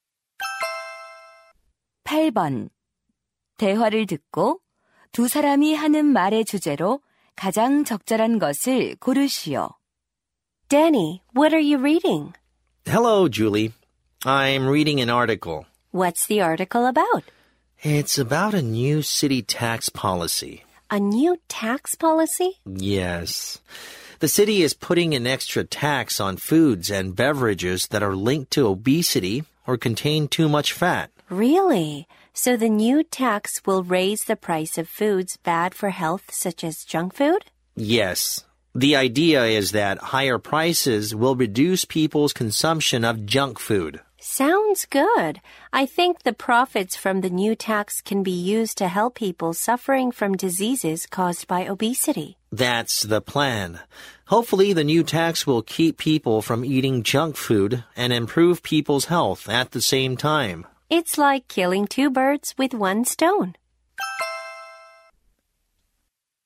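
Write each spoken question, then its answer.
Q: 대화를 듣고 두 사람이 하는 말의 주제로 가장 적절한 것을 고르시오.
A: 비만 유발 식품에 대한 새로운 세금 정책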